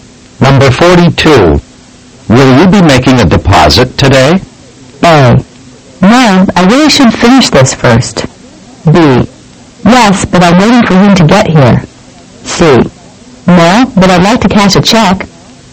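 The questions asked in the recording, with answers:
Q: Will you be making a deposit today?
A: C: No, but I'd like to cash a check.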